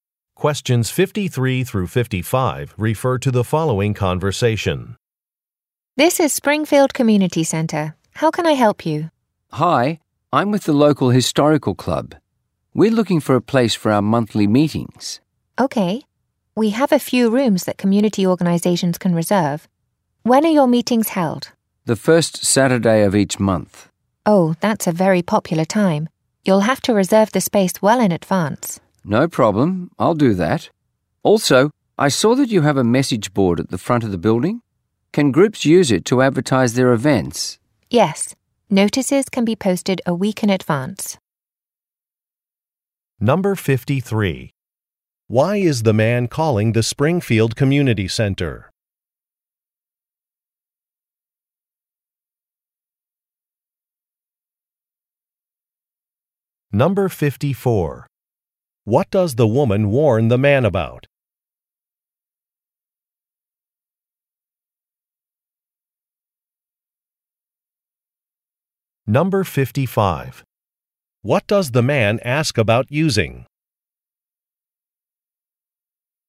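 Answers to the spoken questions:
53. To find a place for his historical club's monthly meetings
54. The first Saturday is a popular time, so he must reserve well in advance
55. The message board at the front of the building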